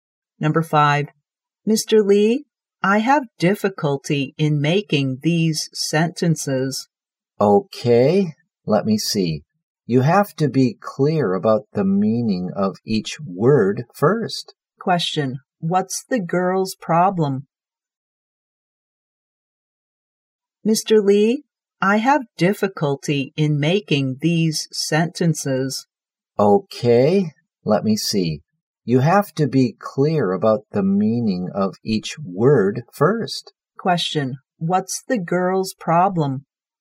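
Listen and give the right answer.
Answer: She has difficulty in making sentences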